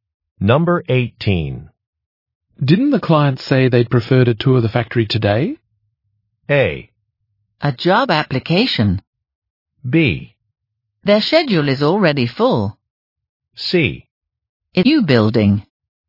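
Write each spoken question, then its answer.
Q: Didn't the client say they'd prefer to tour the factory today?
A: B: Their schedule is already full.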